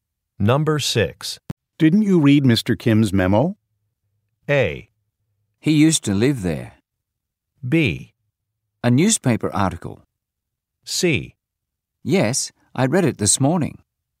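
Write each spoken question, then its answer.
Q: Didn't you read Mr. Kim's memo?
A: C: Yes, I read it this morning.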